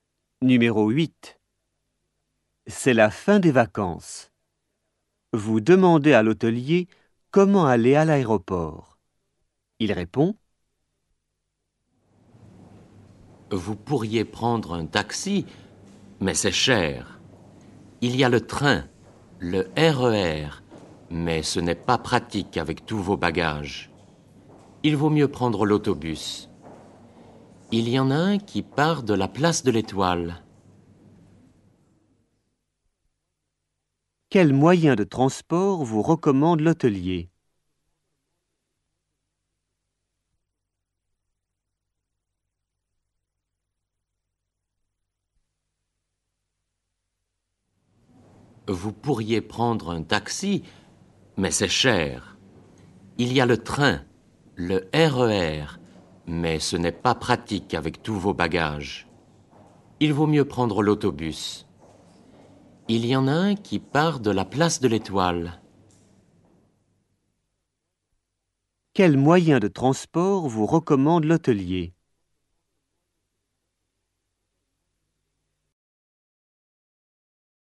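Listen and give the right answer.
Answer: l'autobus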